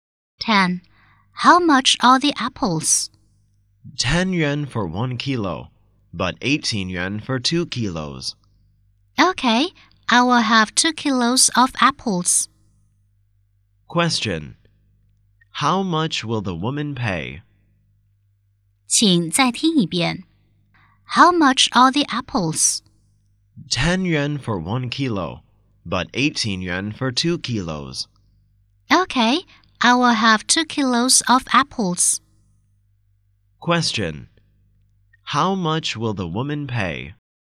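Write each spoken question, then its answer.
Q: How much will the woman pay?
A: 18 yuan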